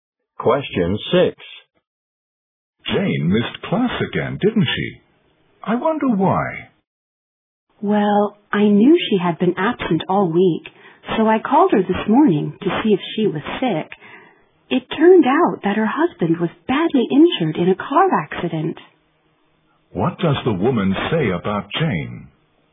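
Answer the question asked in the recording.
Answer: She missed class because her husband was badly injured in a car accident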